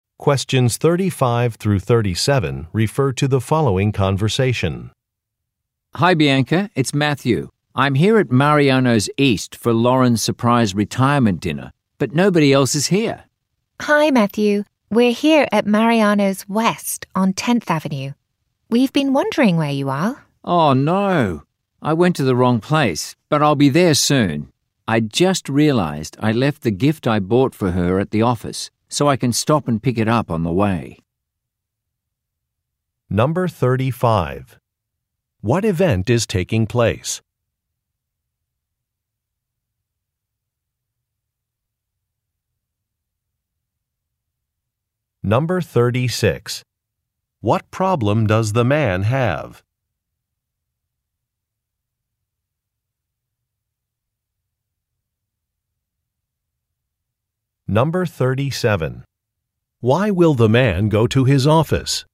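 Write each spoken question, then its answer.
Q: What event is taking place?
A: A surprise retirement dinner

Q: What problem does the man have?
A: He went to the wrong restaurant location

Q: Why will the man go to his office?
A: To pick up the gift he left there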